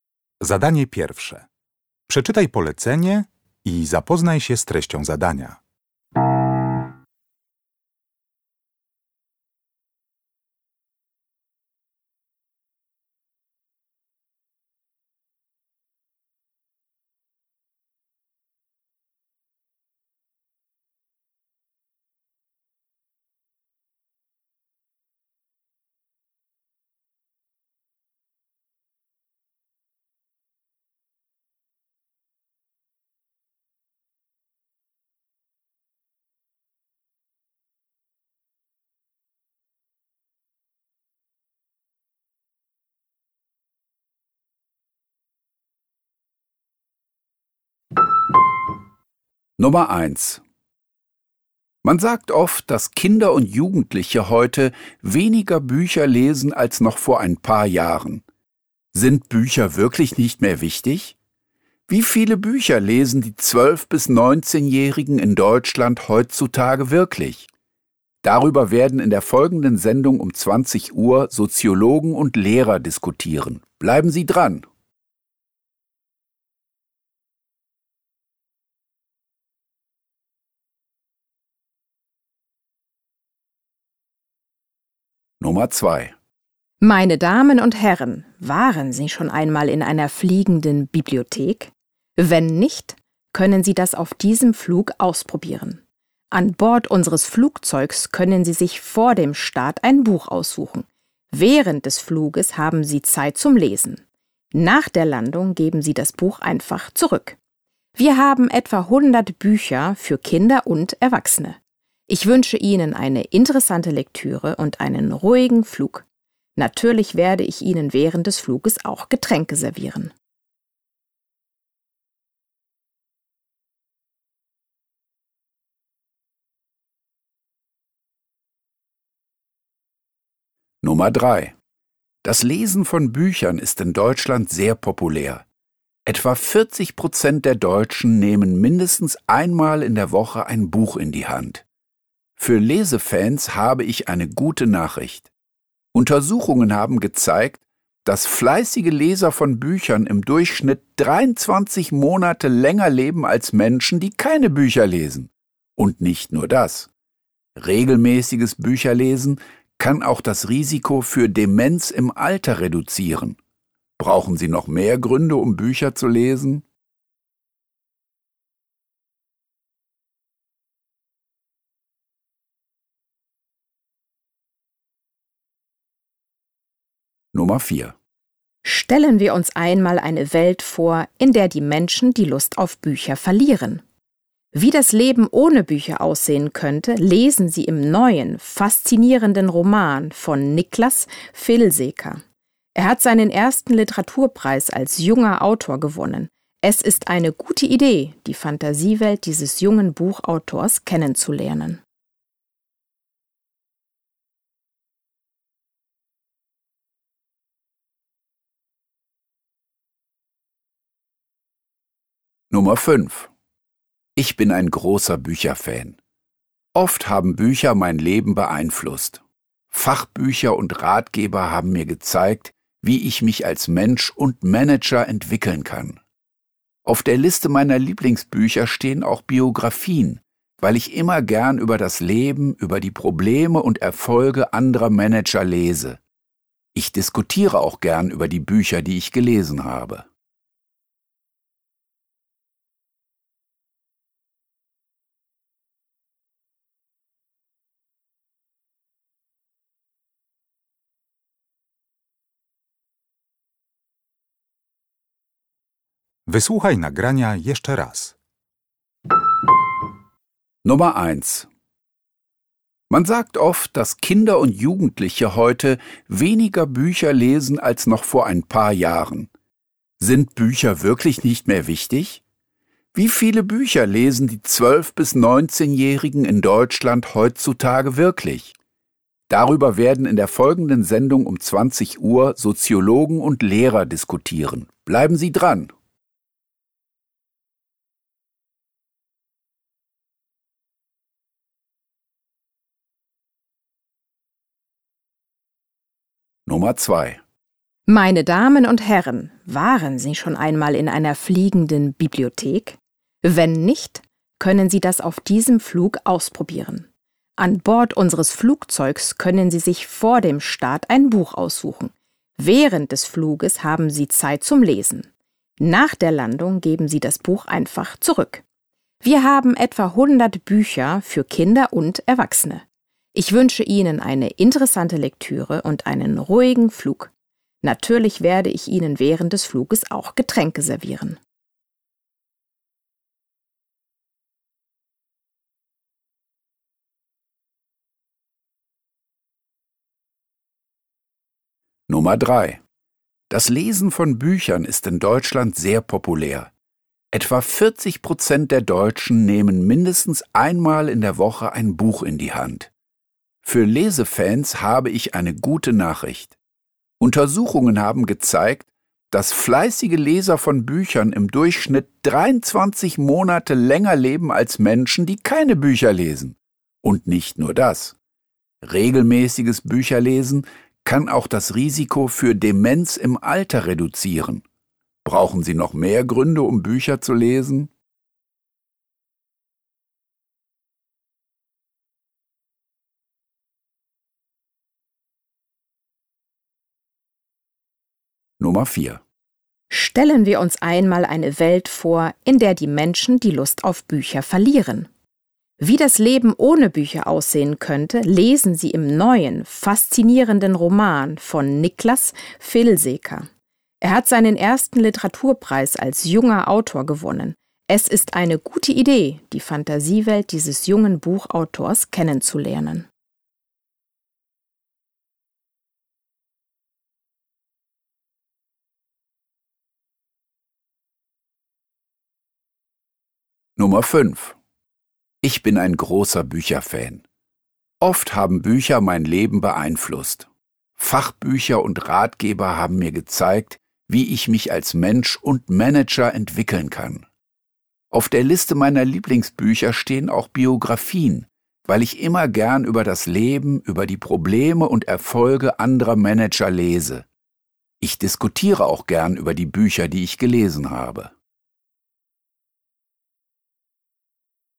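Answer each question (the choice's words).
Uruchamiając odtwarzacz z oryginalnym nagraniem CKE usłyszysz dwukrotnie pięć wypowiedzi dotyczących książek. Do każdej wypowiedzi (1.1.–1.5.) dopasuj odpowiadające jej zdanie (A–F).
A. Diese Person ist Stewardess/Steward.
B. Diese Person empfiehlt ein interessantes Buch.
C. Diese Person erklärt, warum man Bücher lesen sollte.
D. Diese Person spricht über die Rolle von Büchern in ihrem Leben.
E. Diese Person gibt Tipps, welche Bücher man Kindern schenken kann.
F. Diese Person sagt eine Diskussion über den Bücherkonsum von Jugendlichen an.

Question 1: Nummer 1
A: Diese Person sagt eine Diskussion über den Bücherkonsum von Jugendlichen an.

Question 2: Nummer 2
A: Diese Person ist Stewardess/Steward.

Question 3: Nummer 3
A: Diese Person erklärt, warum man Bücher lesen sollte.

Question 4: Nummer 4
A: Diese Person empfiehlt ein interessantes Buch.

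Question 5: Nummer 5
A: Diese Person spricht über die Rolle von Büchern in ihrem Leben.

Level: Poziom: podstawowy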